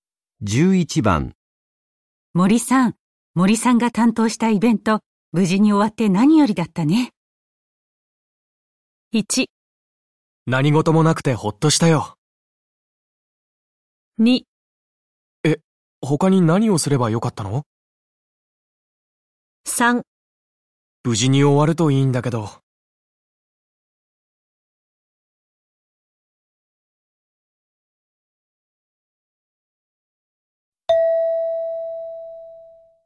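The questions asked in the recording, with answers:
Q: 森さん、森さんが担当したイベント、無事に終わって何よりだったね。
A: 1: 何事もなくてほっとしたよ。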